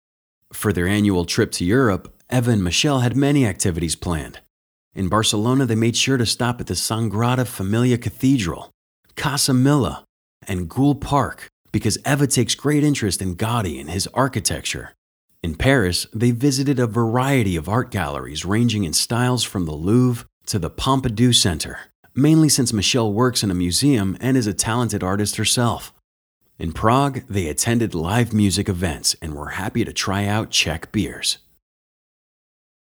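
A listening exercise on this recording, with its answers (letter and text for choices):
Listen to the audio and answer the question.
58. What did Eva and Michelle do in Barcelona?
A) They admired the work of an architect.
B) They took a bus tour of the city.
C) They went to art galleries.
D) They enjoyed the local drinks.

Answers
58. A) They admired the work of an architect.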